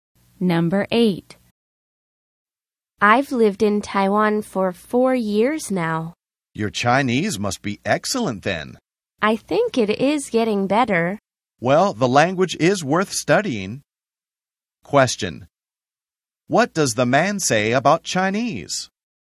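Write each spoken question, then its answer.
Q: What does the man say about Chinese?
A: It is worth studying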